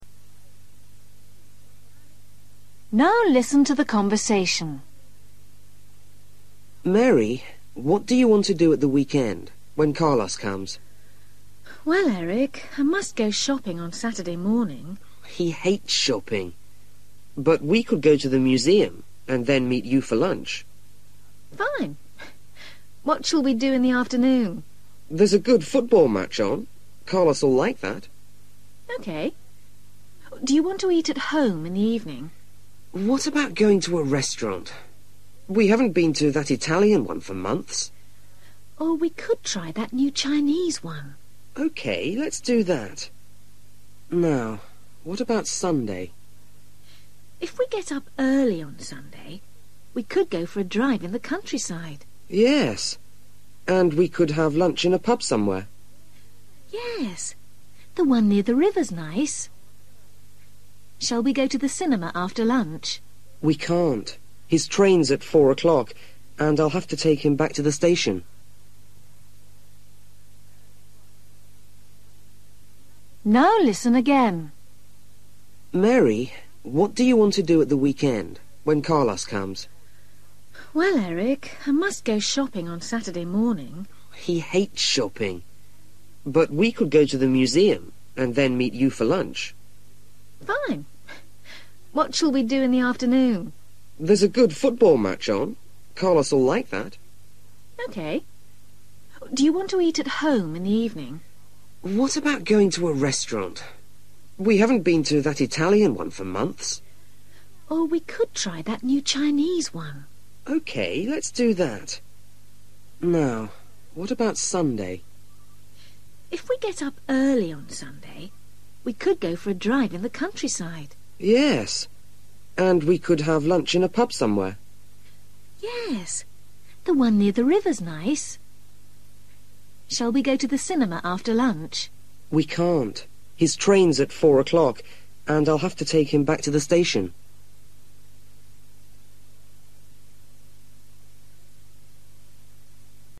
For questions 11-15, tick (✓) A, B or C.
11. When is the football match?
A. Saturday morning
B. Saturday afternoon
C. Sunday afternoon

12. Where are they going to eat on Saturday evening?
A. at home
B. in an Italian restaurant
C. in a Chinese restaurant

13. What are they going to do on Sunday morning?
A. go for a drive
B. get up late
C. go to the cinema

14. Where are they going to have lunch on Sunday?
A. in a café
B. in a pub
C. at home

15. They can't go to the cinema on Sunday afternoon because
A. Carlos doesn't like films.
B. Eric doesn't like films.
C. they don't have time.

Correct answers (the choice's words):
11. Saturday afternoon
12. in a Chinese restaurant
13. go for a drive
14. in a pub
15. they don't have time.

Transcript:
Eric: Mary ... what do you want to do at the weekend, when Carlos comes?
Mary: Well, Eric, I must go shopping on Saturday morning.
Eric: He hates shopping. But we could go to the museum and then meet you for lunch.
Mary: Fine. What shall we do in the afternoon?
Eric: There's a good football match on – Carlos'll like that.
Mary: OK. Do you want to eat at home in the evening?
Eric: What about going to a restaurant? We haven't been to that Italian one for months.
Mary: Or we could try that new Chinese one.
Eric: OK. Let's do that. Now, what about Sunday?
Mary: If we get up early on Sunday, we could go for a drive in the countryside.
Eric: Yes, and we could have lunch in a pub somewhere.
Mary: Yes, the one near the river's nice. Shall we go to the cinema after lunch?
Eric: We can't. His train's at four o'clock and I'll have to take him back to the station.

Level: A2